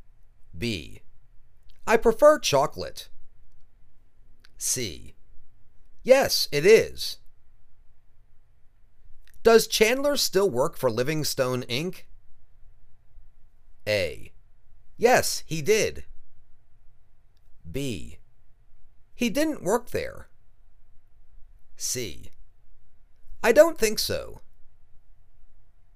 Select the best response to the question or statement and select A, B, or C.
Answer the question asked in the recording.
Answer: I don't think so.